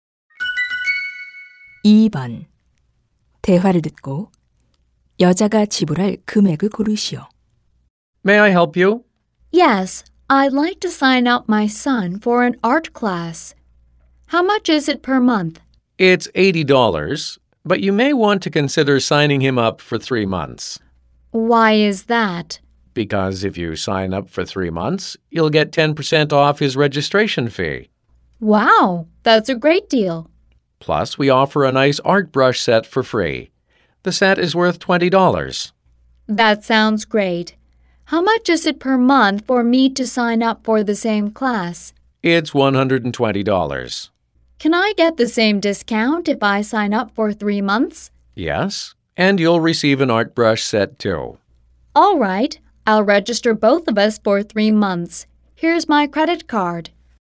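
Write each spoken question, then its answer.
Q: 대화를 듣고 여자가 지불할 금액을 고르시오.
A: $540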